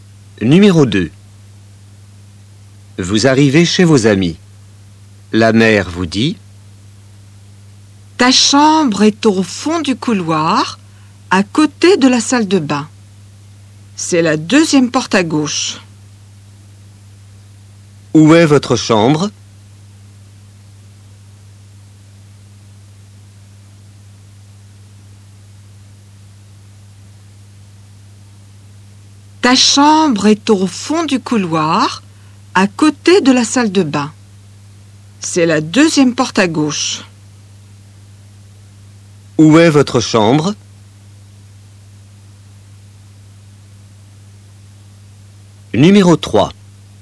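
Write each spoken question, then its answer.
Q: Où est votre chambre?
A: au fond du couloir, à côté de la salle de bain, deuxième porte à gauche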